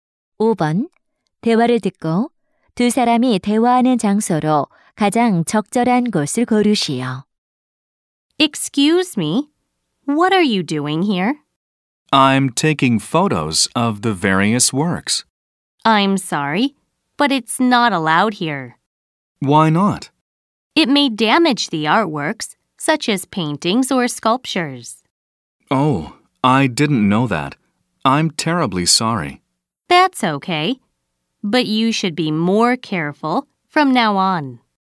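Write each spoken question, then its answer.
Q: 대화를 듣고 두 사람이 대화하는 장소로 가장 적절한 곳을 고르시오.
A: 미술관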